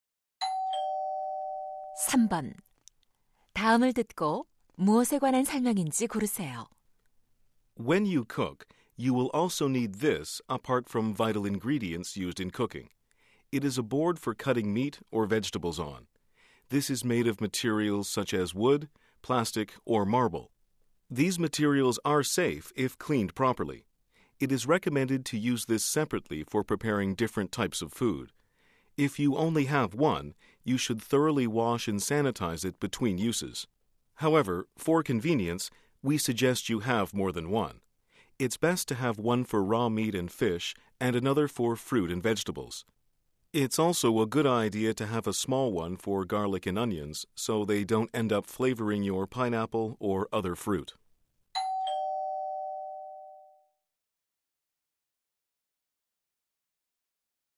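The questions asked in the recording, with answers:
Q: 다음을 듣고 무엇에 관한 설명인지 고르세요.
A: 도마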